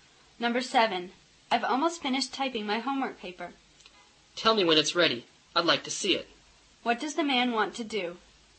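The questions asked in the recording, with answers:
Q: What does the man want to do?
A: See the woman's homework paper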